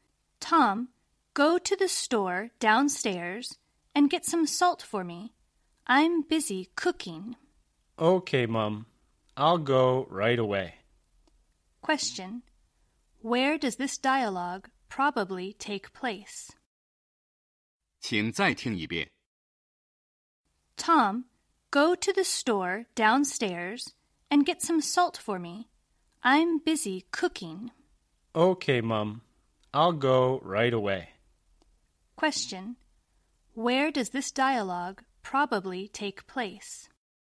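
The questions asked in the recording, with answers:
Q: Where does this dialogue probably take place?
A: At home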